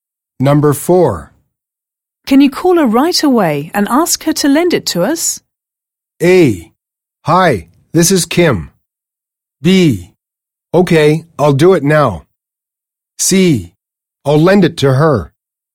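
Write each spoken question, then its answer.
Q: Can you call her right away and ask her to lend it to us?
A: B: Okay, I'll do it now.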